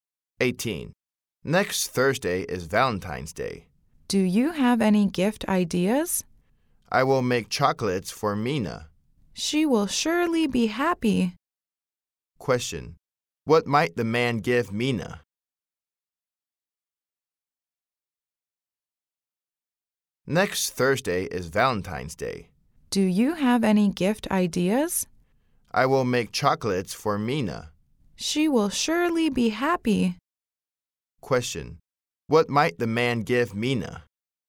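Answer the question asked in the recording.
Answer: Chocolates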